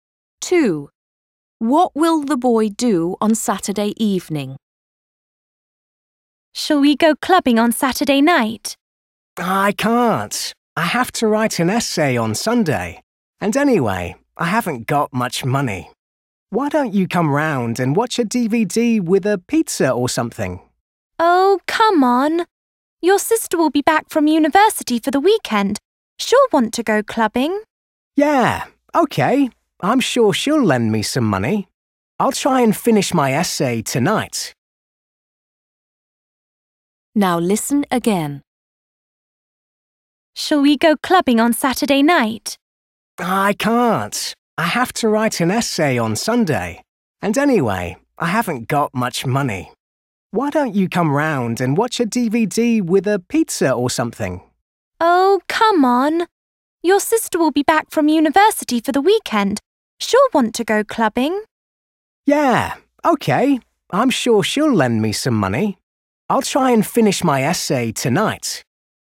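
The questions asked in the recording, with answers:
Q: What will the boy do on Saturday evening?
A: Go clubbing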